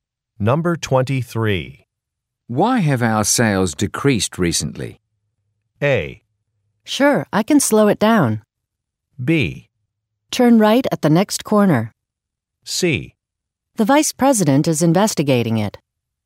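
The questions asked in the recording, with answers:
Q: Why have our sales decreased recently?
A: C: The vice president is investigating it.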